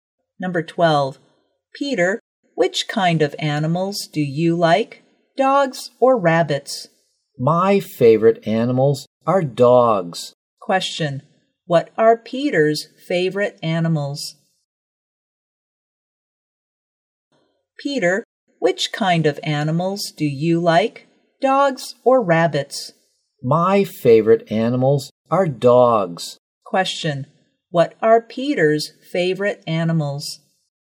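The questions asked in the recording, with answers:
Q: What are Peter's favorite animals?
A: Dogs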